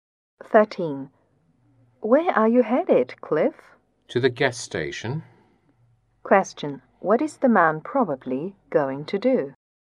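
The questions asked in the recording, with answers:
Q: What is the man probably going to do?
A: Get gas for his car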